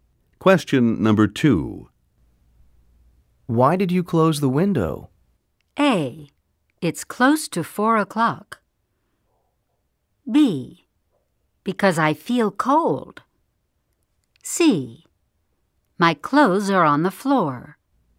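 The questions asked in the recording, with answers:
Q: Why did you close the window?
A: B: Because I feel cold.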